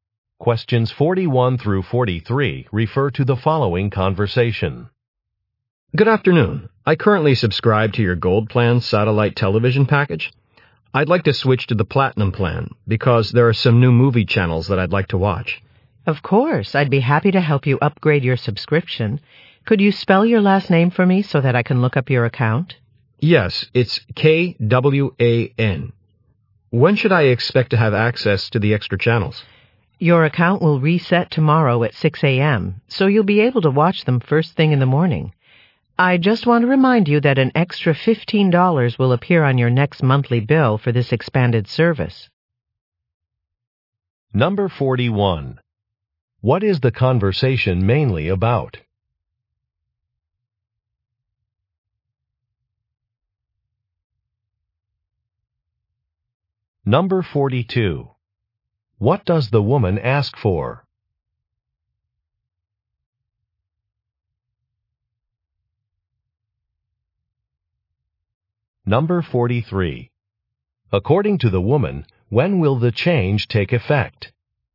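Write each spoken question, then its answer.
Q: What is the conversation mainly about?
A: Upgrading a satellite TV subscription

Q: What does the woman ask for?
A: The man's last name spelled

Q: According to the woman, when will the change take effect?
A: Tomorrow at 6 a.m.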